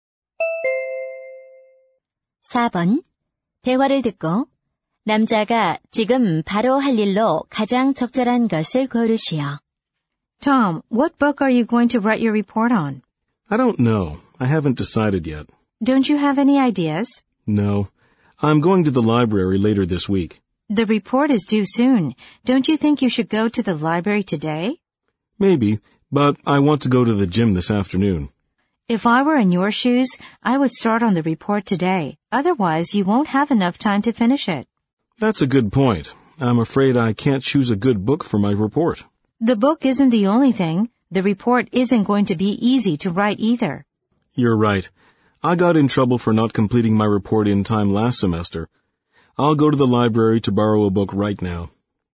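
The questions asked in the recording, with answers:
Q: 대화를 듣고 남자가 지금 바로 할 일로 가장 적절한 것을 고르시오.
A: 도서관에 가서 책 빌리기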